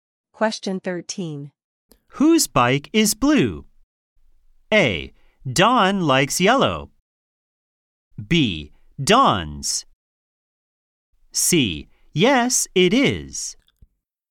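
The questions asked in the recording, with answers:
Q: Whose bike is blue?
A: B: Don's.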